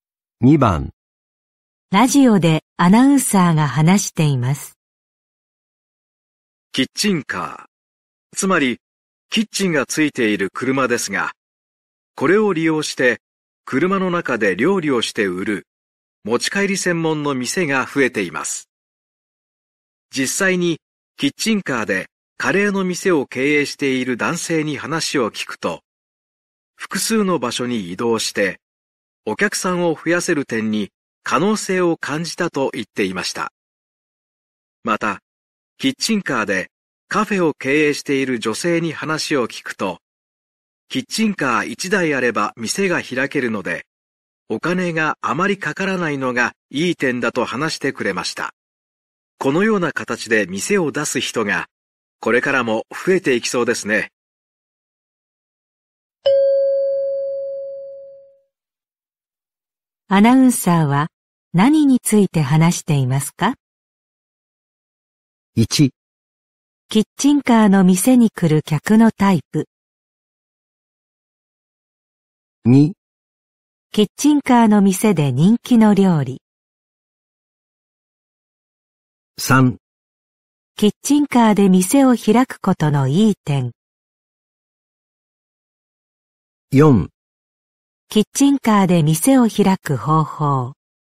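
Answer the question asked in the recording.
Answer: 3: キッチンカーで店を開くことのいい点。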